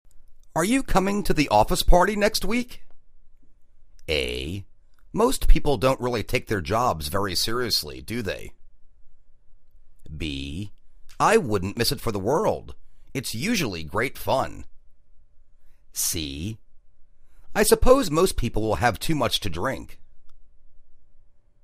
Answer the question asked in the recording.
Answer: I wouldn't miss it for the world. It's usually great fun.